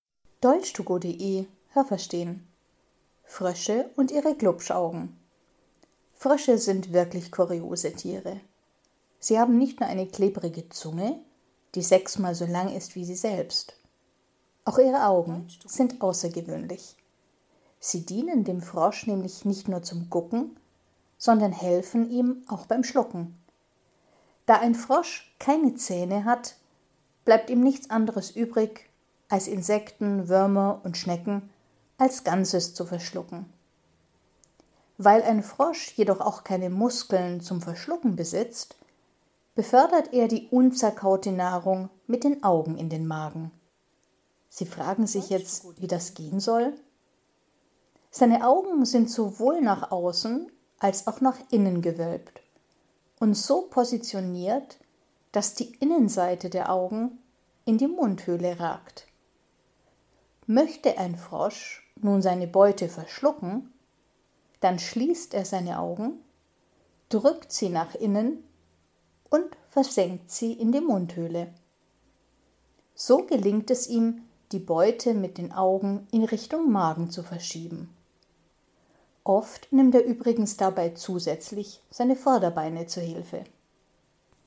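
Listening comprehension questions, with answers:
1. Die Zunge eines Froschs ist gespalten und sechsmal so lang wie ein Frosch.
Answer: falsch

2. Mit seinen Augen kann ein Frosch gucken und spucken.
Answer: falsch

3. Weil er keine Zähne hat, kann ein Frosch seine Beute nicht zerkleinern.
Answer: richtig

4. Da er keine Schluckmuskeln hat, nimmt der Frosch stattdessen seine Augen.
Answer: richtig

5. Die Augen eines Froschs sind nur nach innen gewölbt und ragen in die Mundhöhle.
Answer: falsch

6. Wenn ein Frosch seine Beute verschlucken möchte, muss er seine Augen ganz weit öffnen und nach innen drücken.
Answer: falsch

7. Wenn ein Frosch seine Augen in die Mundhöhle versenkt, transportiert er so die Beute in Richtung Magen.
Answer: richtig

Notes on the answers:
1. Die Zunge ist nicht gespalten, sondern klebrig.
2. Er kann damit gucken und schlucken.
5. Sie sind nach innen und außen gewölbt.
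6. Er muss dafür die Augen zumachen.

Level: Hörtexte C (schwer)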